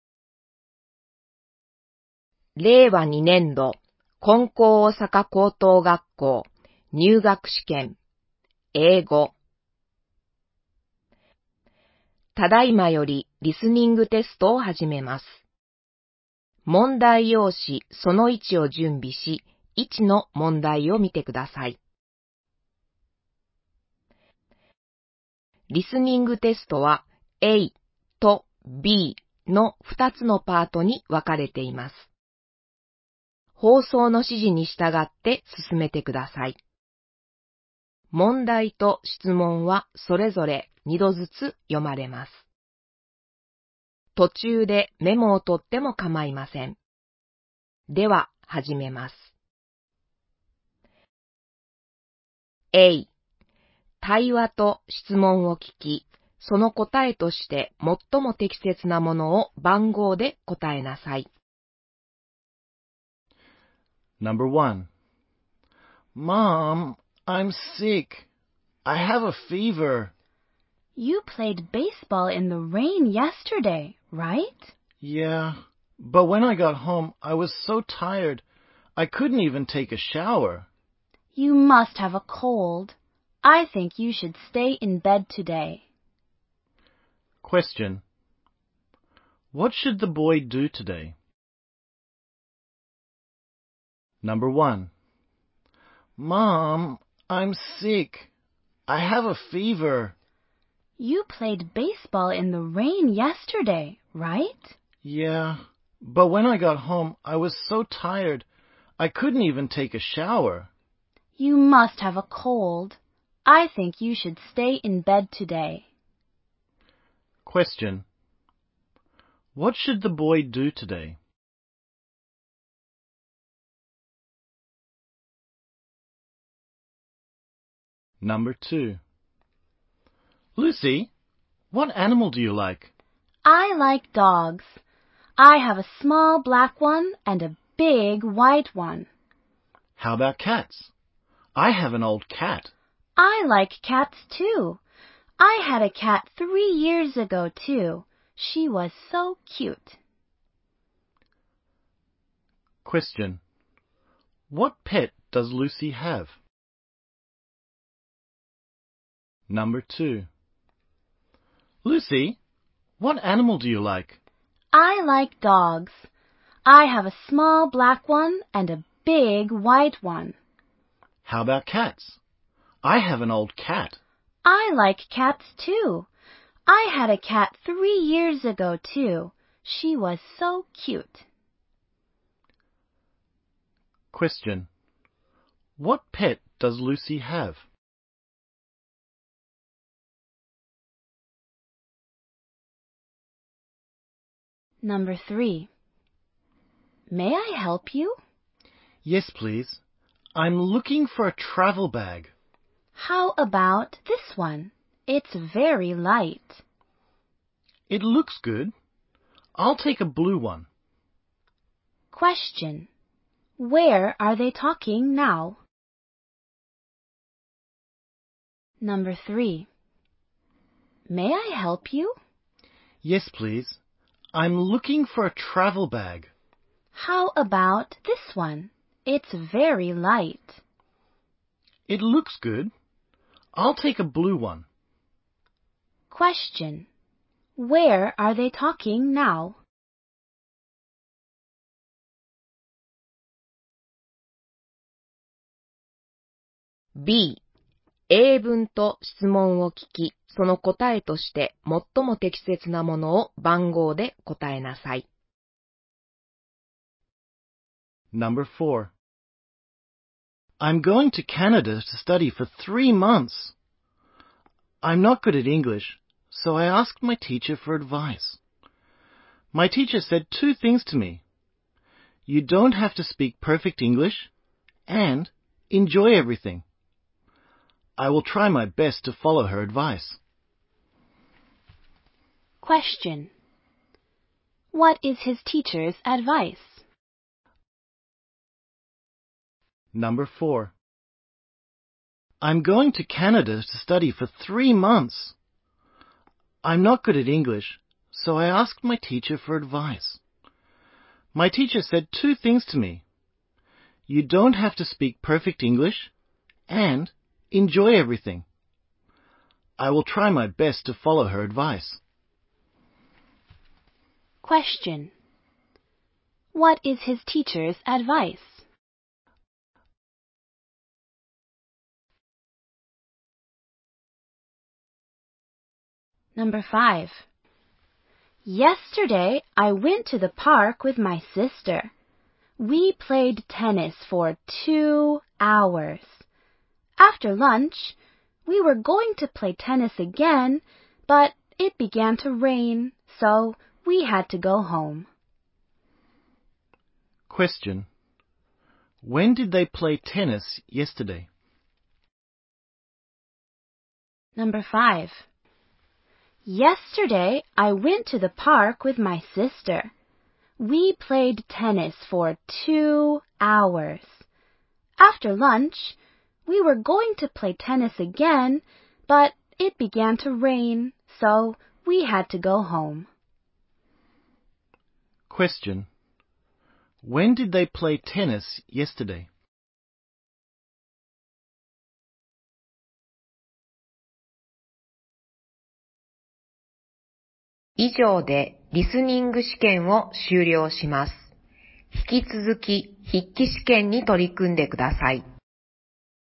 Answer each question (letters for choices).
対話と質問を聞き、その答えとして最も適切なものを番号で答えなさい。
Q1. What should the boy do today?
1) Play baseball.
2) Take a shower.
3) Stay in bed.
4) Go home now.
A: 3

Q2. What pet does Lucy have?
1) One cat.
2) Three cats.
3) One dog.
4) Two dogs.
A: 4

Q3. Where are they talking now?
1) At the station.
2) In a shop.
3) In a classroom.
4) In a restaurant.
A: 2

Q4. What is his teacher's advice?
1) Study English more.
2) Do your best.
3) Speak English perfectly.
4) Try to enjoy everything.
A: 4

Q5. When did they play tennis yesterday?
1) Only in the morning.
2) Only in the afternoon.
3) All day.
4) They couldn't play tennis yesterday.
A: 1

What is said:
ただいまより、リスニングテストを始めます。
リスニングテストは[A][B]の2つのパートに分かれています。
放送の指示に従って進めて下さい。問題と質問はそれぞれ2度ずつ読まれます。
途中でメモをとってもかまいません。では始めます。
[A] 対話と質問を聞き、その答えとして最も適切なものを番号で答えなさい。
※以下の選択肢が問題用紙に記載されていますので、正解をひとつ選びます。
[B] 英文と質問を聞き、その答えとして最も適切なものを番号で答えなさい。
※以下の選択肢が問題用紙に記載されていますので、正解をひとつ選びます。
令和2年度 リスニング問題 答え
• A : Mom, I'm sick. I have a fever.
• B : You played baseball in the rain yesterday, right?
• A : Yeah , but when I got home, I was so tired. I couldn't even take a shower.
• B : You must have a cold. I think you should stay in bed today.
Question : What should the boy do today?
正解答:3
• A : Lucy, what animal do you like?
• B : I like dogs. I have a small black one and a big white one.
• A : How about cats? I have an old cat.
• B : I like cats, too. I had a cat three years ago, too. She was so cute.
Question : What pet does Lucy have?
正解答:4
• A : May I help you?
• B : Yes, please . I'm looking for a travel bag.
• A : How about this one? It's very light.
• B : It looks good. I'll take a blue one.
Question : Where are they talking now?
正解答:2
I am going to Canada to study for three months. I'm not good at English, so I asked my teacher for advice . My teacher said two things to me, "You don't have to speak perfect English , and enjoy everything." I will try my best to follow her advice.
Question :What is his teacher's advice?
正解答:4
2. Yesterday I went to the park with my sister. We played tennis for two hours. After lunch, we were going to play tennis again, but it began to rain, so we had to go home.
Question : When did they play tennis yesterday?

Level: 高校